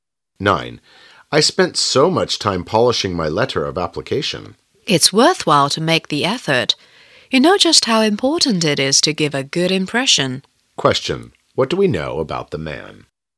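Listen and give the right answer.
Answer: He worked hard on his application letter to make a good impression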